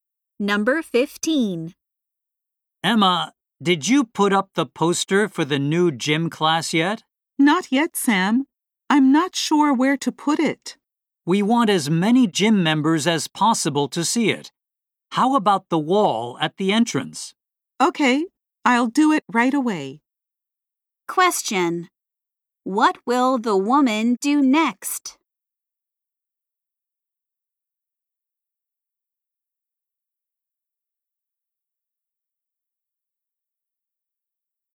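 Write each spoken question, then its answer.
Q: What will the woman do next?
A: Put up the poster on the wall at the entrance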